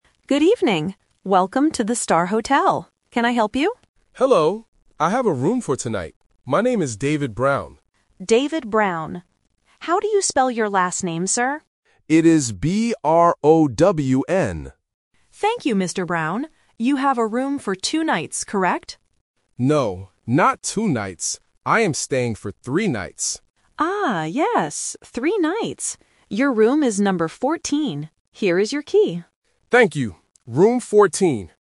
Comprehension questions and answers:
Listen to the conversation at the hotel and choose the correct answer (A, B, or C).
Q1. How does the man spell his last name?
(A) B-R-A-W-N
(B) B-R-O-W-M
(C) B-R-O-W-N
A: B-R-O-W-N

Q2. How many nights is the man staying?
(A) Two nights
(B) Three nights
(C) Four nights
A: Three nights

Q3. What is his room number?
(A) Room 14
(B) Room 40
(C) Room 4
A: Room 14

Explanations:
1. David spells his last name clearly letter by letter: B-R-O-W-N. Option (A) is a trap with the wrong vowel sound "A", and Option (B) is a trap with the similar-sounding consonant "M" at the end.
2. The receptionist asks if he is staying for "two nights" (The Trap). David corrects her by saying, "No, not two nights. I am staying for three nights." Students must listen for the negative word "No" to reject option A. Option C is not mentioned.
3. The receptionist says, "Your room is number 14," and David repeats it: "Room 14." Option (B) is the classic pronunciation trap, testing the difference between the "-teen" sound (14) and the "-ty" sound (40).

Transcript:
Receptionist: Good evening. Welcome to the Star Hotel. Can I help you?
Tourist: Hello. I have a room for tonight. My name is David Brown.
Receptionist: David Brown. How do you spell your last name, sir?
Tourist: It is B-R-O-W-N.
Receptionist: Thank you, Mr. Brown. You have a room for two nights, correct?
Tourist: No, not two nights. I am staying for three nights.
Receptionist: Ah, yes. Three nights. Your room is number 14. Here is your key.

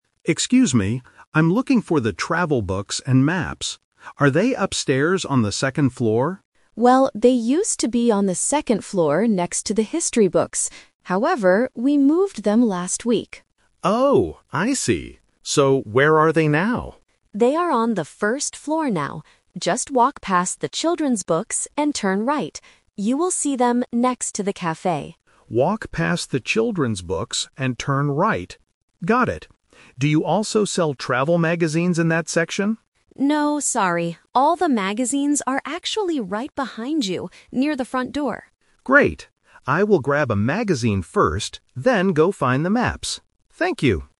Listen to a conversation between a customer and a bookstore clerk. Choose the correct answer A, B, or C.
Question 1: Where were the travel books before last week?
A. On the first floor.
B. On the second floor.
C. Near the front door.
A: On the second floor.

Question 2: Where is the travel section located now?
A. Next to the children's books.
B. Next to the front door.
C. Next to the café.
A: Next to the café.

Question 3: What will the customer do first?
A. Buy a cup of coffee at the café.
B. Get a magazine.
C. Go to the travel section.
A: Get a magazine.

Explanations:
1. The clerk says, "they used to be on the second floor." "Used to be" means they were there in the past.
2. The clerk gives directions and says, "You will see them next to the café."
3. The customer says at the end, "I will grab a magazine first, then go find the maps."

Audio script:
Customer: Excuse me. I'm looking for the travel books and maps. Are they upstairs on the second floor?
Clerk: Well, they used to be on the second floor next to the history books. However, we moved them last week.
Customer: Oh, I see. So where are they now?
Clerk: They are on the first floor now. Just walk past the children's books and turn right.
Customer: Walk past the children's books and turn right. Got it. Do you also sell travel magazines in that section?
Clerk: No, sorry. All the magazines are actually right behind you, near the front door.
Customer: Great. I will grab a magazine first, then go find the maps. Thank you!

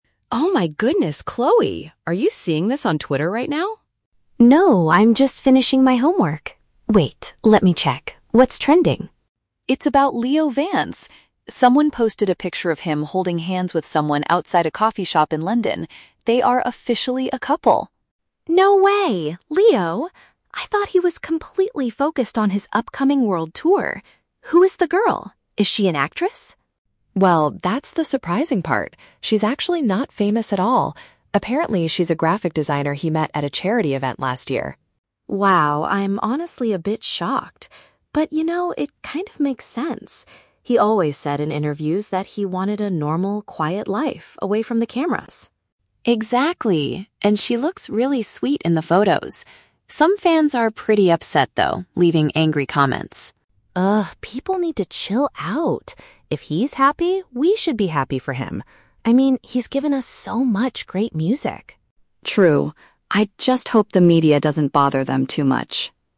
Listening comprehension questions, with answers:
Listen to a conversation between two fans and choose the correct answer (A, B, or C) for each question.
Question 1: How does Chloe feel when she first hears the news?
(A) She is angry because she wanted him to prioritize his tour.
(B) She is very surprised because she thought his main focus was his career.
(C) She is disappointed because she doesn't like his new girlfriend.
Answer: She is very surprised because she thought his main focus was his career.

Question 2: Who is Leo's new partner?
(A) A well-known movie actress.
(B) A regular person with an artistic job.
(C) A photographer he worked with on his tour.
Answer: A regular person with an artistic job.

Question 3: What is Chloe's attitude toward the angry fans?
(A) She thinks they should calm down and support his personal life.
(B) She completely agrees with them and feels betrayed by Leo.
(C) She believes they will eventually stop listening to his music.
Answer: She thinks they should calm down and support his personal life.

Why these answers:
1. Chloe says "No way! [...] I thought he was completely focused on his upcoming world tour." This shows she is surprised because she believed his career was his priority.
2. Emma says the girl is "not famous at all" and is a "graphic designer" (which paraphrases to a "regular person with an artistic job").
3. Chloe says "people need to chill out" (calm down) and "If he's happy, we should be happy for him" (support his personal life).

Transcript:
Emma: Oh my goodness, Chloe! Are you seeing this on Twitter right now?
Chloe: No, I'm just finishing my homework. Wait, let me check. What's trending?
Emma: It's about Leo Vance! Someone posted a picture of him holding hands with someone outside a coffee shop in London. They are officially a couple!
Chloe: No way! Leo? I thought he was completely focused on his upcoming world tour. Who is the girl? Is she an actress?
Emma: Well, that's the surprising part. She's actually not famous at all. Apparently, she's a graphic designer he met at a charity event last year.
Chloe: Wow, I'm honestly a bit shocked. But, you know, it kind of makes sense. He always said in interviews that he wanted a normal, quiet life away from the cameras.
Emma: Exactly! And she looks really sweet in the photos. Some fans are pretty upset, though, leaving angry comments.
Chloe: Ugh, people need to chill out. If he's happy, we should be happy for him. I mean, he's given us so much great music.

